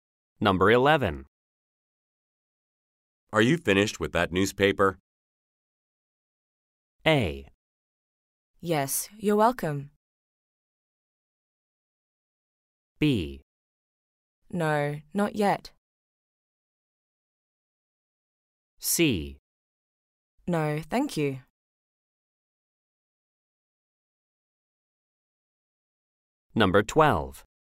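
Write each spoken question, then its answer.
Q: Are you finished with that newspaper?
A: B: No, not yet.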